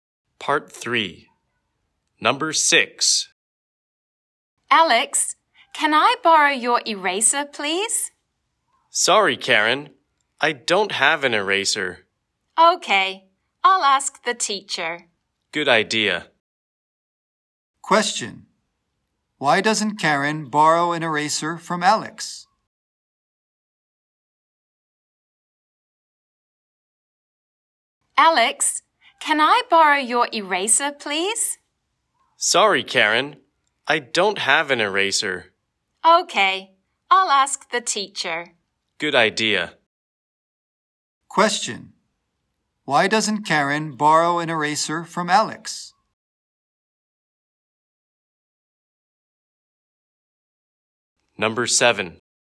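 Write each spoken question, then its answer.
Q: Why doesn't Karen borrow an eraser from Alex?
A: Alex doesn't have an eraser.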